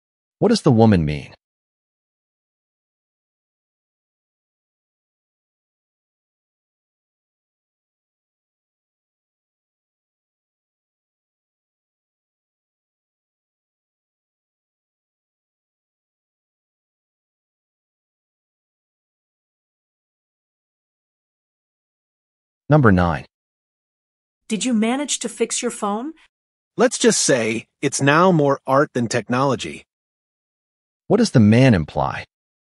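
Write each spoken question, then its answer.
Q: What does the man imply?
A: He couldn't fix the phone; it no longer works.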